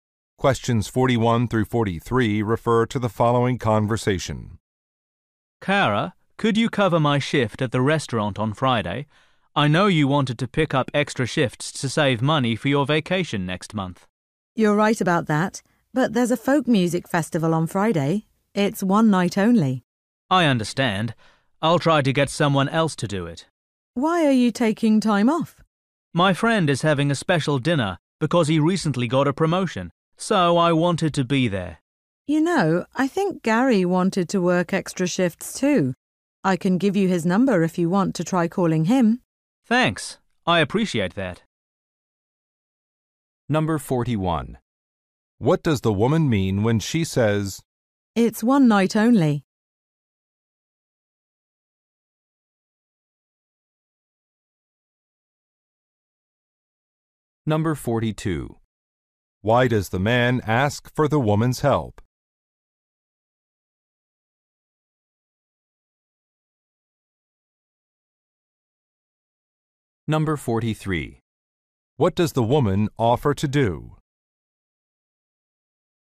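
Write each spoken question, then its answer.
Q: "It's one night only"?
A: She doesn't want to miss the festival, so she can't cover the shift

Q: Why does the man ask for the woman's help?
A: He wants to attend a friend's celebration dinner

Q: What does the woman offer to do?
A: Give him Gary's phone number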